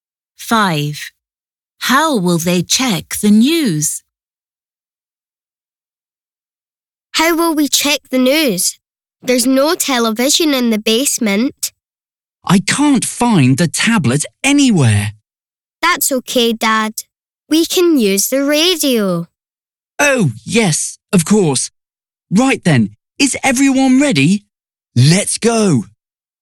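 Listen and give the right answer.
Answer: with the radio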